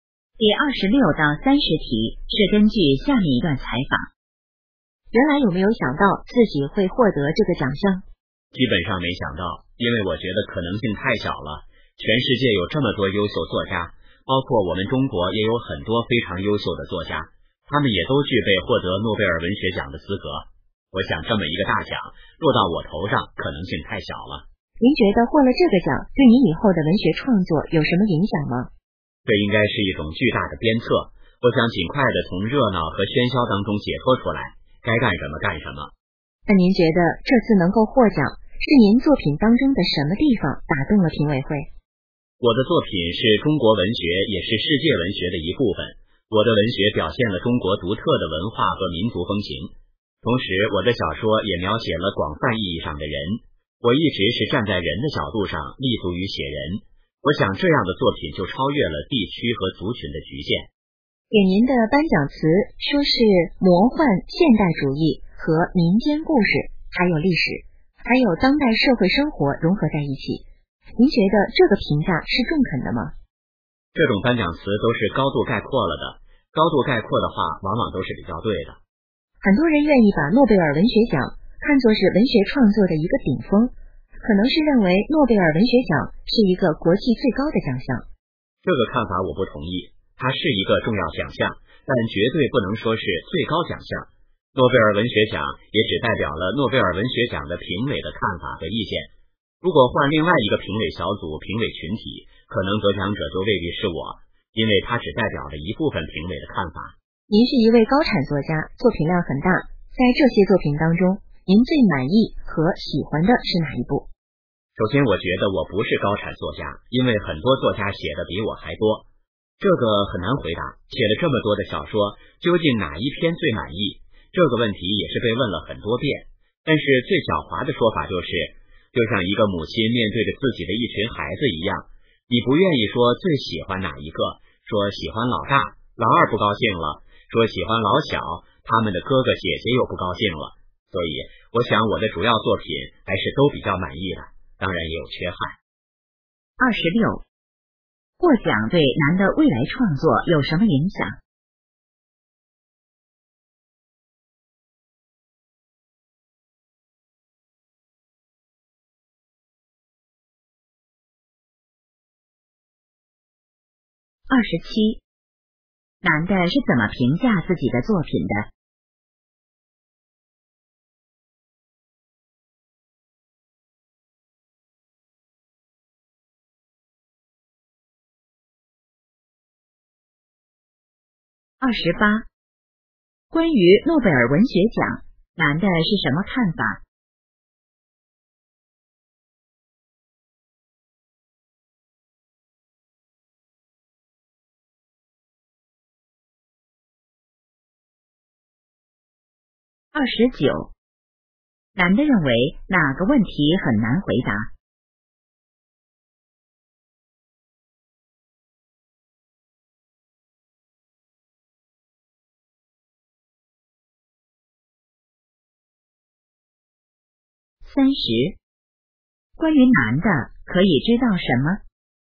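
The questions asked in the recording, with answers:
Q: 获奖对男的未来创作有什么影响?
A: 是一种巨大的鞭策

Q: 男的是怎么评价自己的作品的?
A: 主要作品都比较满意,但也有缺憾

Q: 关于诺贝尔文学奖,男的是什么看法?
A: 是重要奖项,但不是最高奖项

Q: 男的认为哪个问题很难回答。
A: 最满意哪一部作品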